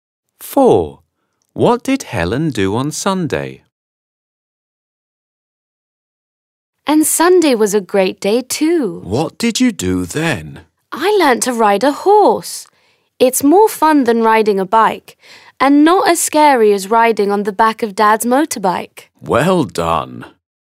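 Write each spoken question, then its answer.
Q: What did Helen do on Sunday?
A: learnt to ride a horse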